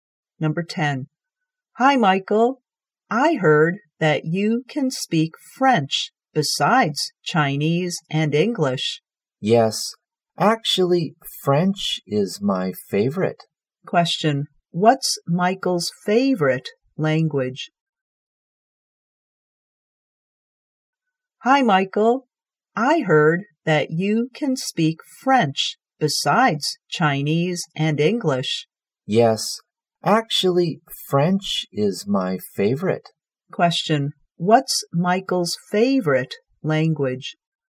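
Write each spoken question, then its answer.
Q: what's Michael's favorite language?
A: French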